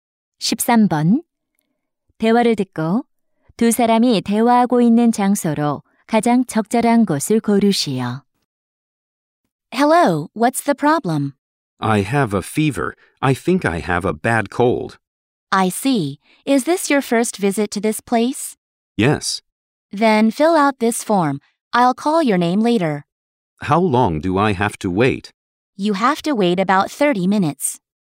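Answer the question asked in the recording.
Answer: 병원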